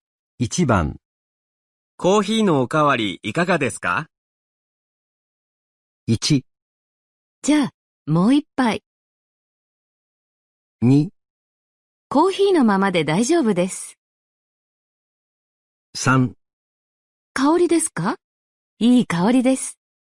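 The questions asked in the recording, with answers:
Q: コーヒーのおかわりいかがですか?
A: 1: じゃあ、もう一杯。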